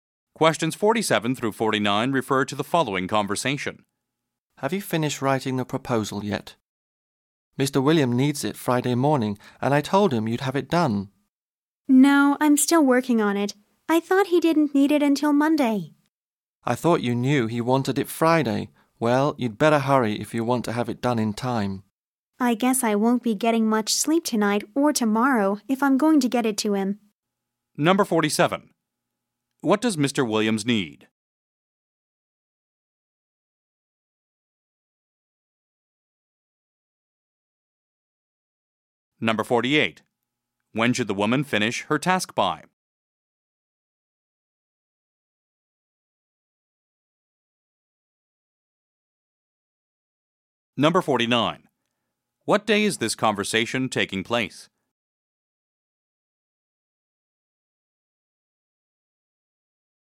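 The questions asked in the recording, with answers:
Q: What does Mr. Williams need?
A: The proposal

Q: When should the woman finish her task by?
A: Friday morning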